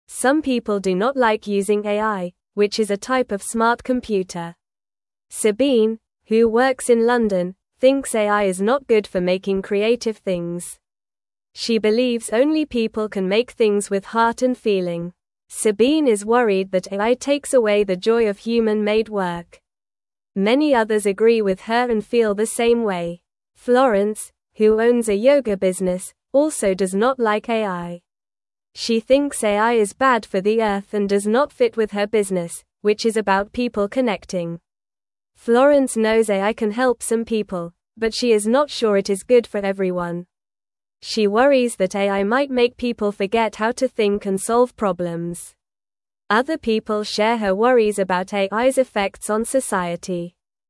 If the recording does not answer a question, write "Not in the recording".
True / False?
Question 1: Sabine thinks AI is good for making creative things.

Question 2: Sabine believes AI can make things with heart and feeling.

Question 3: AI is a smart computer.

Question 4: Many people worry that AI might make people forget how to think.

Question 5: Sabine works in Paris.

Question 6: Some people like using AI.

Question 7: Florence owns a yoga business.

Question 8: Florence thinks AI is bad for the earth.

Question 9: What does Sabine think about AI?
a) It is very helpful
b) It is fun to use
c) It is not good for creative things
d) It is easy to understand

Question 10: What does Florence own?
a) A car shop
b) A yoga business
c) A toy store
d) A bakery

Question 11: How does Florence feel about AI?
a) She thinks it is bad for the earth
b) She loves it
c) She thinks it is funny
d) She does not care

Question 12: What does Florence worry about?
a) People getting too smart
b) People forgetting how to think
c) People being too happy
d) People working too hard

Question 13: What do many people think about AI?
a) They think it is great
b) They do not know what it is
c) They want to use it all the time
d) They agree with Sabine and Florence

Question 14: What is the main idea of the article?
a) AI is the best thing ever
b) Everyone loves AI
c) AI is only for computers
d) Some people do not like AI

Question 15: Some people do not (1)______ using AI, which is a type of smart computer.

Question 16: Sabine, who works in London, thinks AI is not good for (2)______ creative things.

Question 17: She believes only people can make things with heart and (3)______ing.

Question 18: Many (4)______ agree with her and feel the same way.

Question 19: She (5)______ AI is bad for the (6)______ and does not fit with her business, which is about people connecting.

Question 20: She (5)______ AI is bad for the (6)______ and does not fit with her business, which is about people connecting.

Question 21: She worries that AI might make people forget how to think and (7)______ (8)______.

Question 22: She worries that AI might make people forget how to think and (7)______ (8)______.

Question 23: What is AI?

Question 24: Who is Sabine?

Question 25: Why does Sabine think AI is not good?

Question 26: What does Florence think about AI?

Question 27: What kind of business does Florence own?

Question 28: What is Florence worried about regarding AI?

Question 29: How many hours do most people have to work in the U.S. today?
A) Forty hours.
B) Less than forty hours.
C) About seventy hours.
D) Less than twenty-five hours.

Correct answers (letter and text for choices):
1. False
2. False
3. True
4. True
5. False
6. False
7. True
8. True
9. c) It is not good for creative things
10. b) A yoga business
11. a) She thinks it is bad for the earth
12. b) People forgetting how to think
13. d) They agree with Sabine and Florence
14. d) Some people do not like AI
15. like
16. making
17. feel
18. others
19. thinks
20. earth
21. solve
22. problems
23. AI is a smart computer that can do things like a person.
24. Sabine is a person who works in London.
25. Sabine thinks AI is not good because it can't make things with heart and feeling.
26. Florence thinks AI is bad for the earth and does not fit with her business.
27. Florence owns a yoga business.
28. Florence is worried that AI might make people forget how to think and solve problems.
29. Not in the recording

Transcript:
Some people do not like using AI, which is a type of smart computer. Sabine, who works in London, thinks AI is not good for making creative things. She believes only people can make things with heart and feeling. Sabine is worried that AI takes away the joy of human-made work. Many others agree with her and feel the same way.
Florence, who owns a yoga business, also does not like AI. She thinks AI is bad for the earth and does not fit with her business, which is about people connecting. Florence knows AI can help some people, but she is not sure it is good for everyone. She worries that AI might make people forget how to think and solve problems. Other people share her worries about AI's effects on society.

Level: Level 1